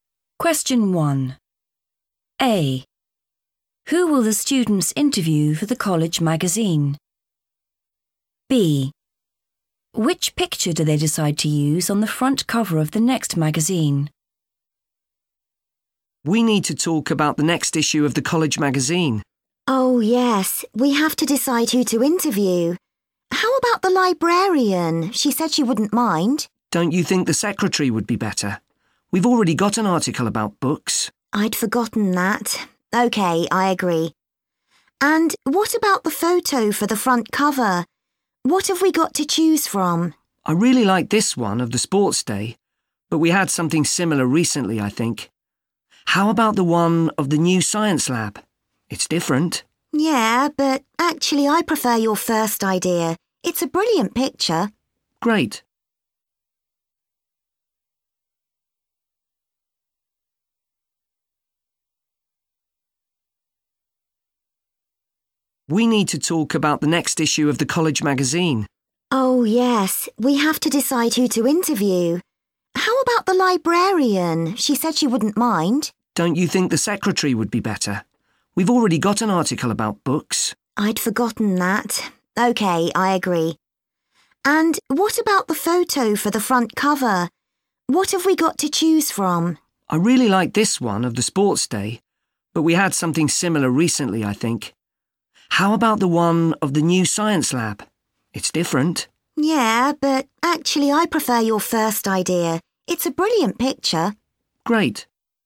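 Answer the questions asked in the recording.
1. the secretary
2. the sports day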